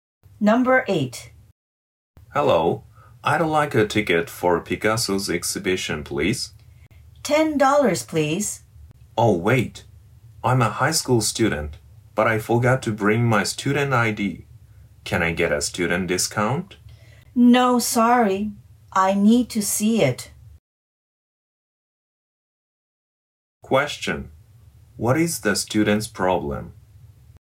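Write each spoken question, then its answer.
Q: What is the student's problem?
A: She forgot to bring her student ID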